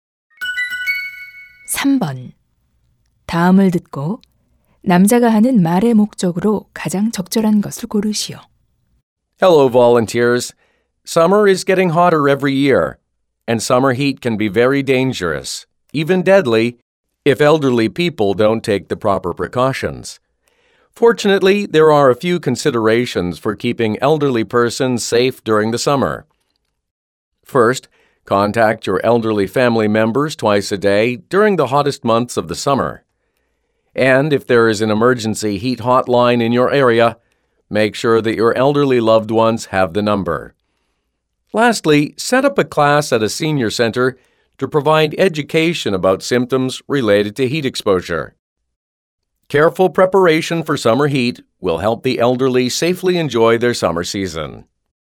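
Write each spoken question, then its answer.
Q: 3번 다음을 듣고 남자가 하는 말의 목적으로 가장 적절한 것을 고르시오.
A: 여름철 노인 더위 안전을 위한 고려 사항을 안내하려고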